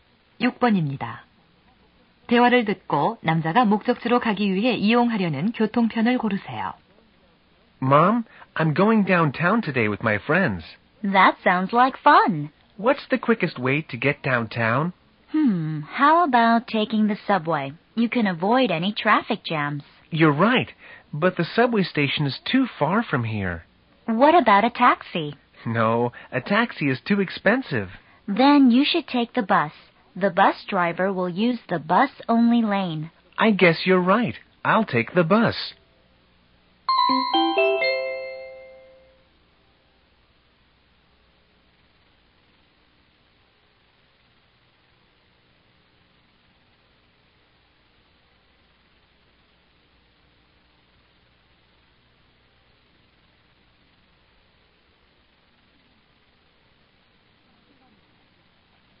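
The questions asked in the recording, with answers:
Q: 대화를 듣고 남자가 목적지로 가기 위해 이용하려는 교통편을 고르세요.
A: 버스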